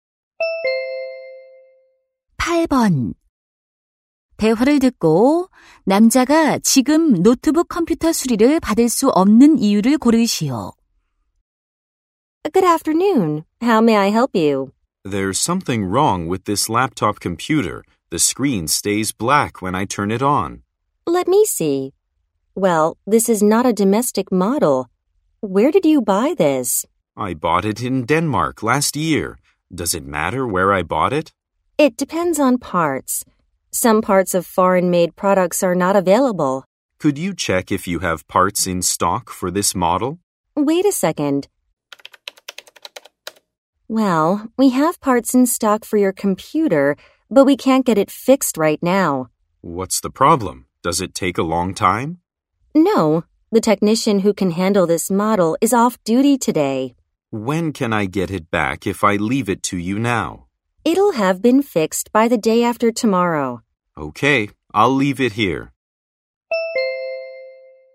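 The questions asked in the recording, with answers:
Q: 대화를 듣고 남자가 지금 노트북 컴퓨터 수리를 받을 수 없는 이유를 고르시오.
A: 해당 모델을 다룰 수 있는 기술자가 오늘 근무하지 않아서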